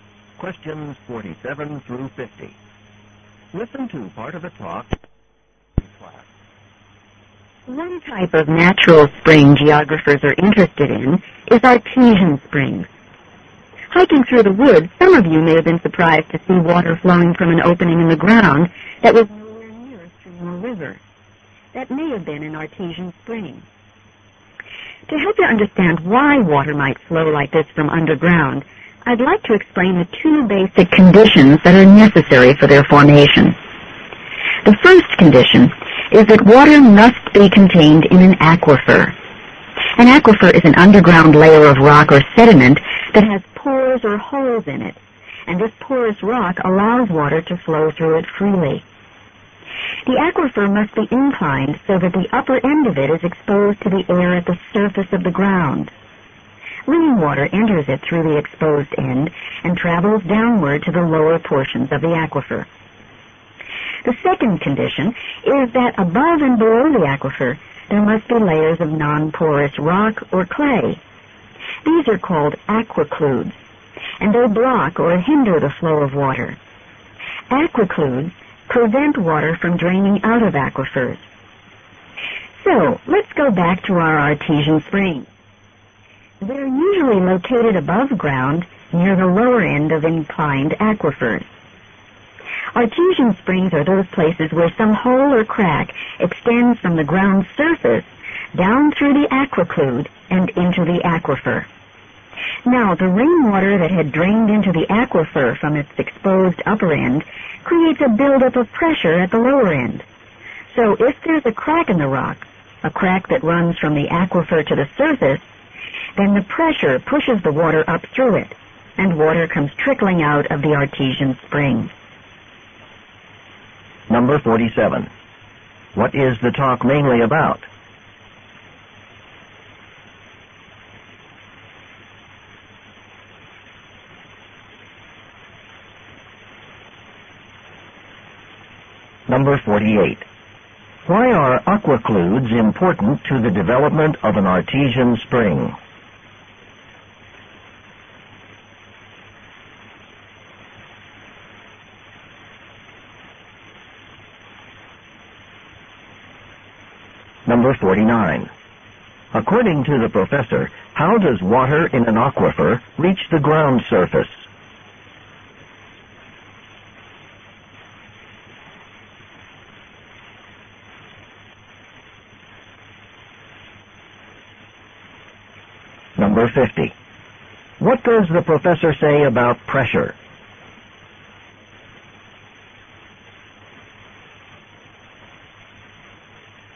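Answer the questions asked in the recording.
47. How artesian springs form
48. They keep water from draining out of the aquifer
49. Through a crack running from the aquifer through the aquiclude to the surface
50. Rainwater builds up pressure at the lower end of the aquifer, which pushes the water up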